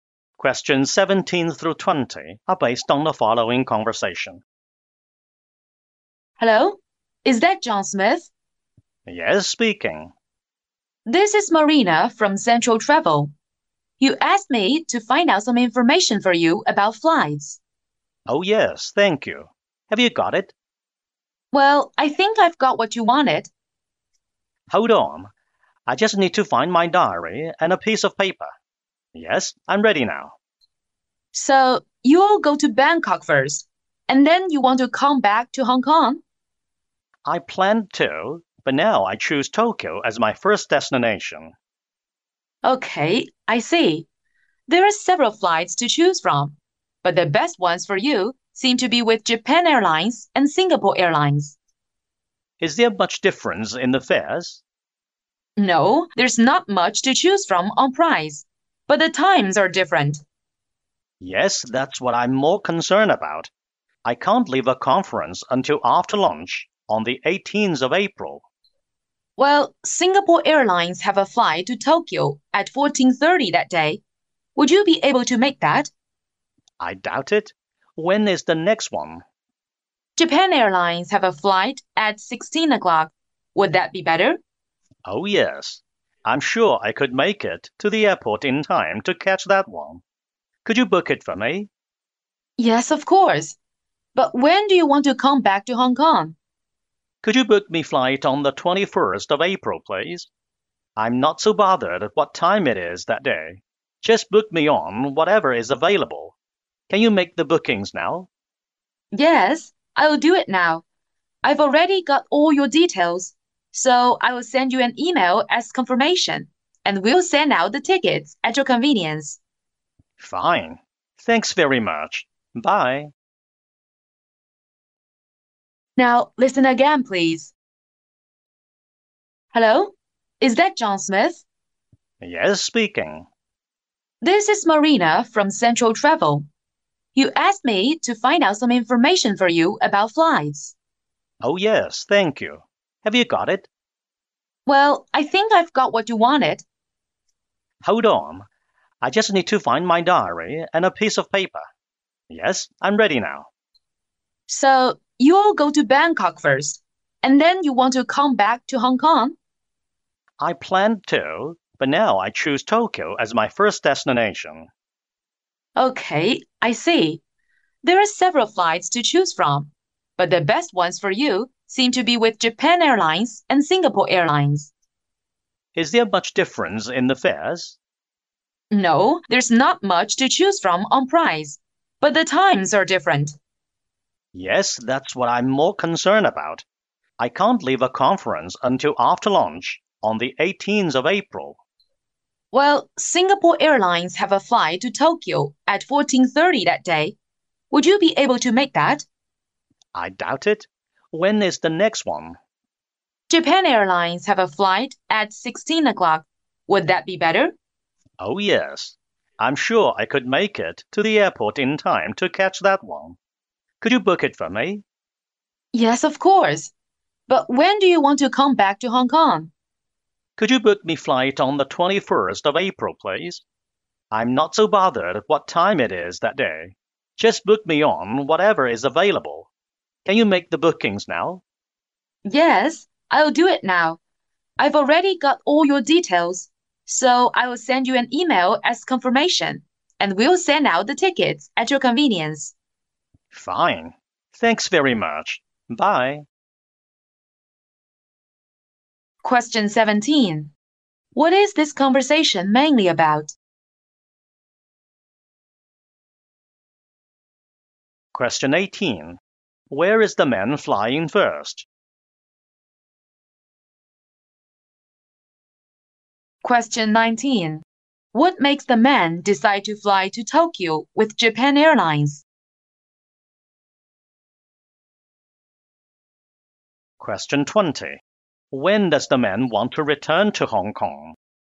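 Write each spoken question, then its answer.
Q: What is this conversation mainly about?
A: Booking flights

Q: Where is the man flying first?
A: Tokyo

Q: What makes the man decide to fly to Tokyo with Japan Airlines?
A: The flight time suits him

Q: When does the man want to return to Hong Kong?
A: On the 21st of April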